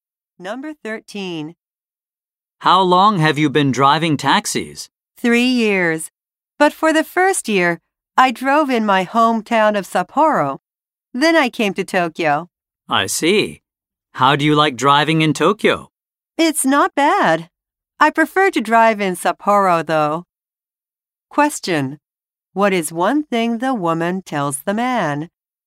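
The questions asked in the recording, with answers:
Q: What is one thing the woman tells the man?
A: She prefers driving in Sapporo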